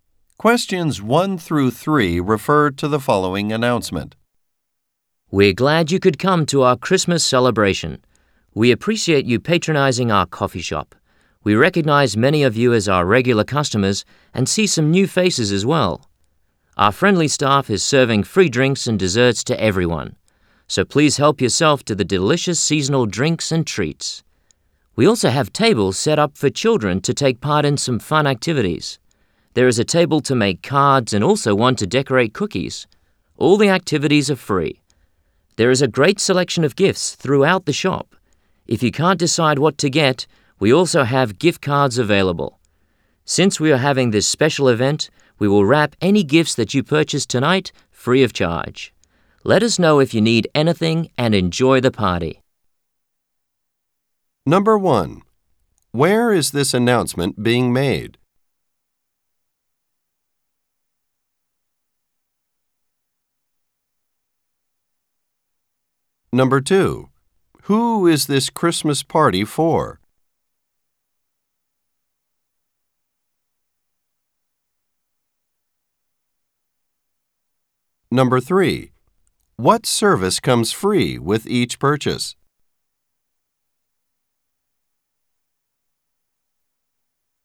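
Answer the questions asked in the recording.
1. At a coffee shop
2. The coffee shop's customers
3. Gift wrapping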